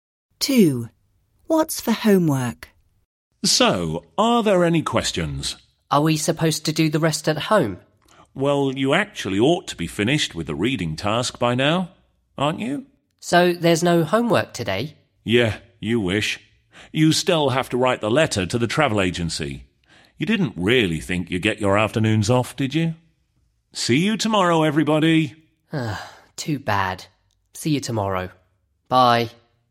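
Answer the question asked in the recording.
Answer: Writing a letter to the travel agency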